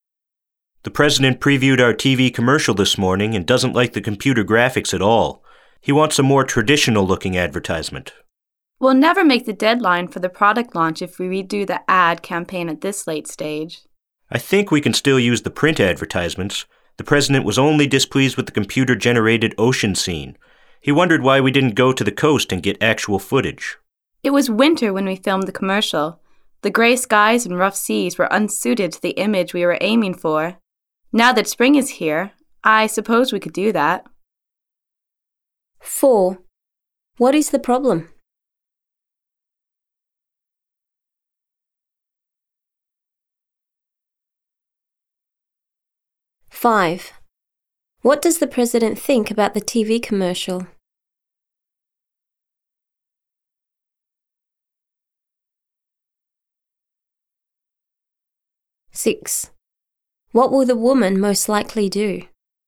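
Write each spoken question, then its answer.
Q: What is the problem?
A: The president doesn't like the computer graphics in the TV commercial.

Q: What does the president think about the TV commercial?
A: He dislikes the computer-generated ocean scene and wants a more traditional look.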